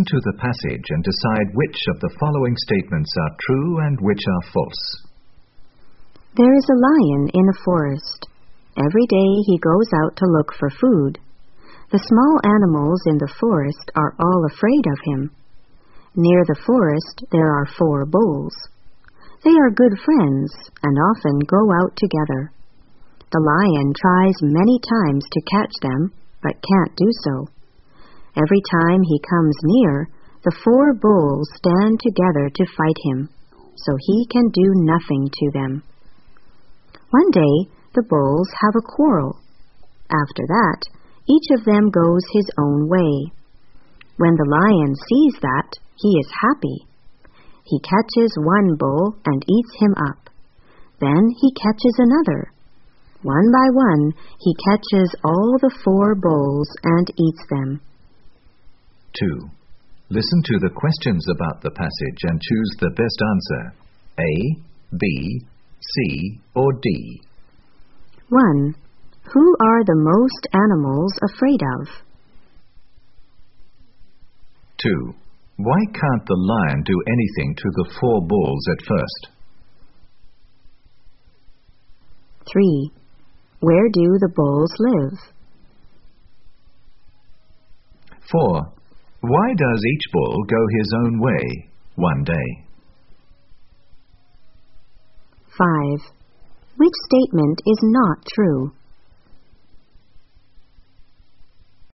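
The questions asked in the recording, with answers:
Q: Who are the most animals afraid of?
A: The lion

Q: Why can't the lion do anything to the four bulls at first?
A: The four bulls stand together to fight him

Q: Where do the bulls live?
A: Near the forest

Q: Why does each bull go his own way one day?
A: They have a quarrel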